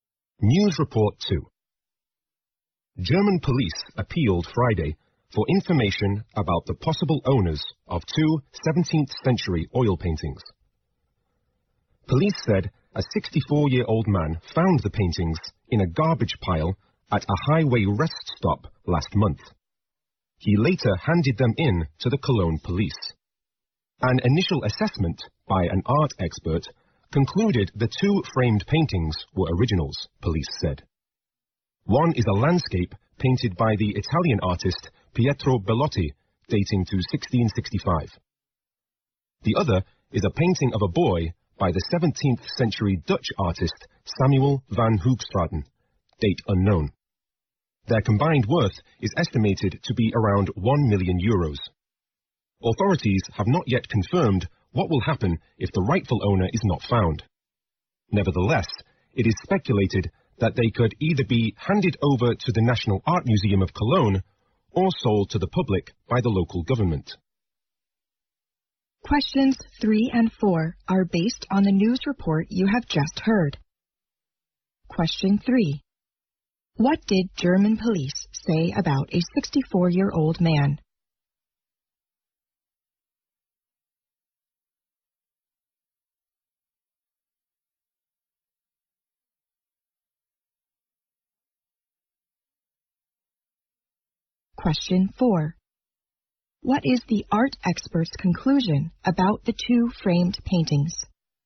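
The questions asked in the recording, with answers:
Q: What did German police say about a 64-year-old man?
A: He found two paintings in a garbage pile at a highway rest stop.

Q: What is the art expert's conclusion about the two framed paintings?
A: They were originals.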